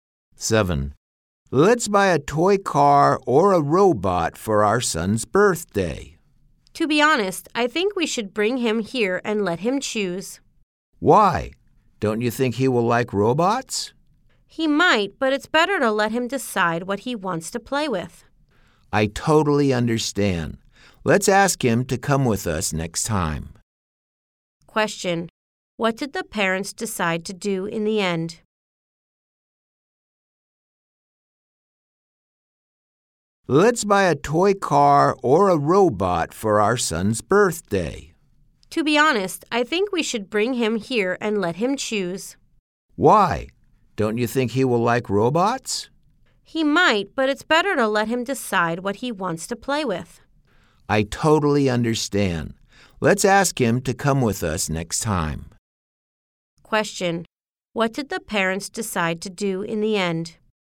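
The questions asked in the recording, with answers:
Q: What did the parents decide to do in the end?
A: Bring their son with them next time and let him choose.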